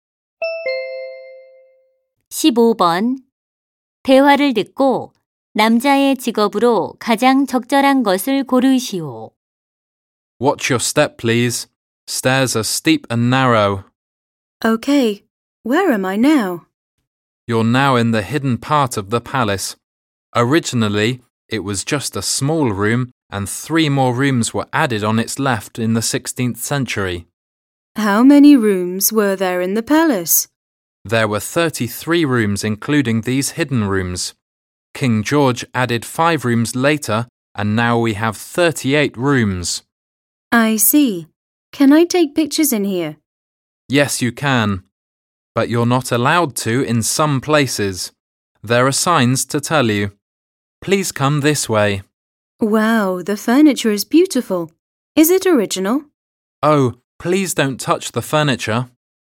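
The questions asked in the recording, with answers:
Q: 대화를 듣고 남자의 직업으로 가장 적절한 것을 고르시오.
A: 관광 가이드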